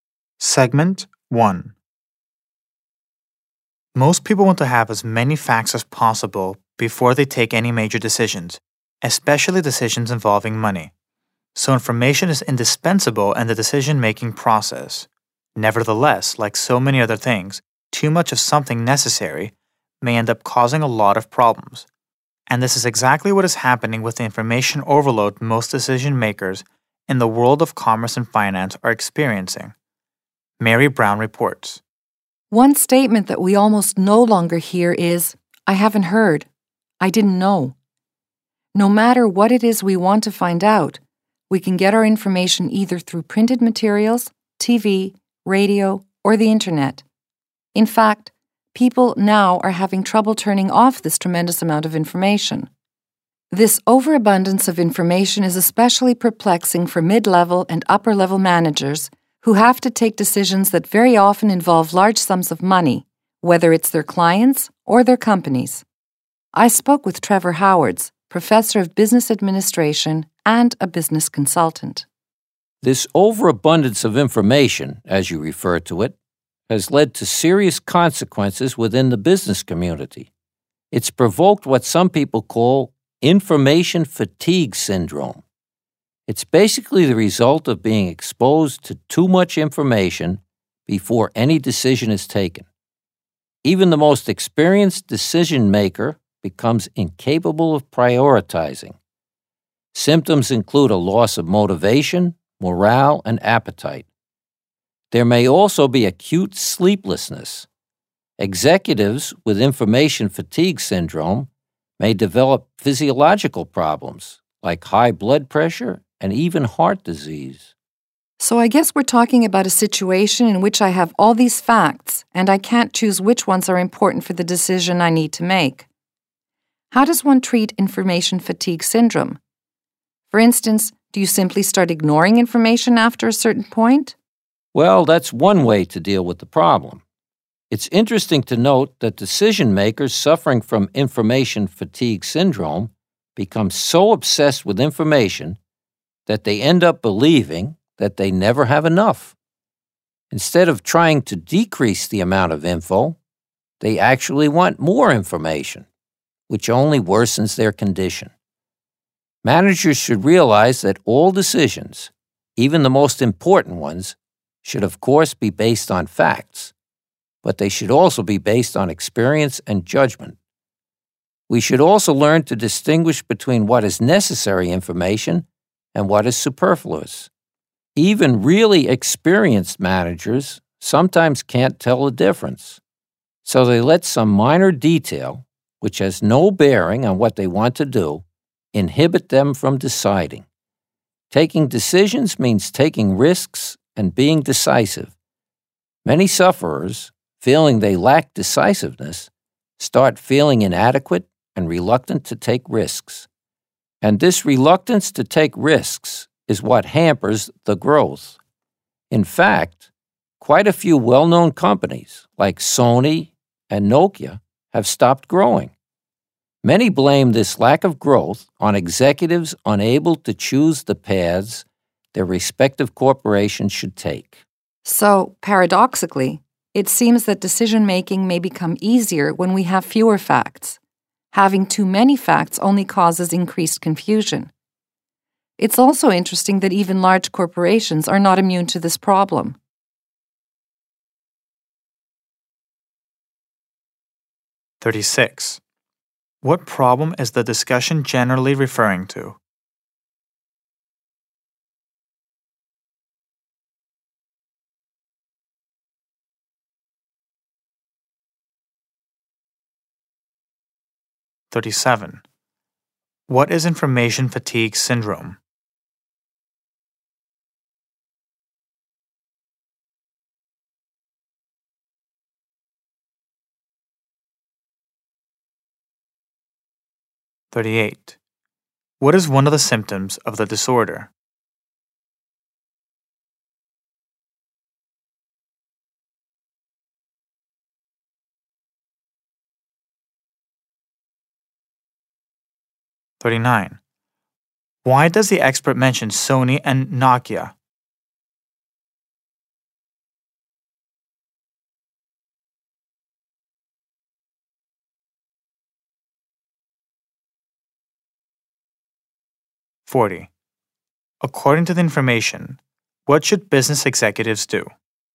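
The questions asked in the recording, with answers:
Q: What problem is the discussion generally referring to?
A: Information overload: decision-makers have too much information

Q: What is information fatigue syndrome?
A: A condition caused by being exposed to too much information before taking a decision, so the person can't prioritize

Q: What is one of the symptoms of the disorder?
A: Loss of motivation, morale or appetite, or sleeplessness

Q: Why does the expert mention Sony and Nokia?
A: As examples of companies that stopped growing because executives couldn't decide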